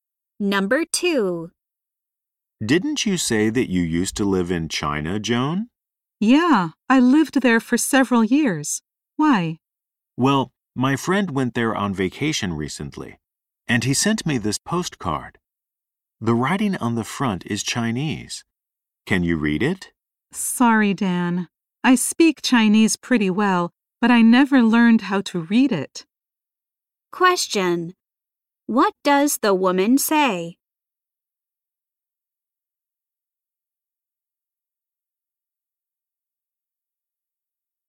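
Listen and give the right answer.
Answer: She cannot read Chinese.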